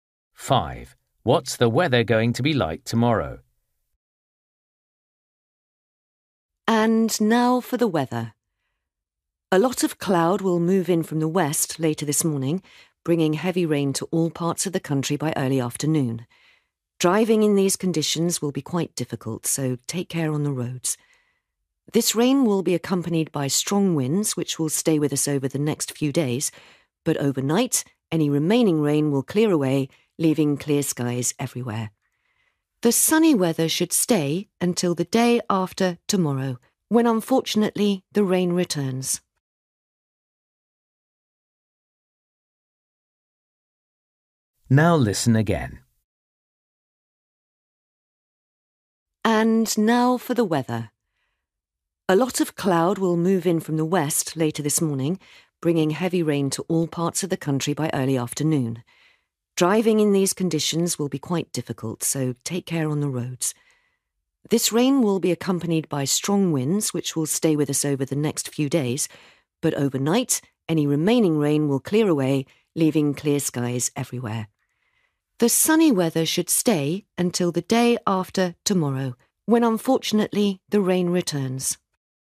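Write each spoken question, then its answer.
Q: What's the weather going to be like tomorrow?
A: Sunny with clear skies, and windy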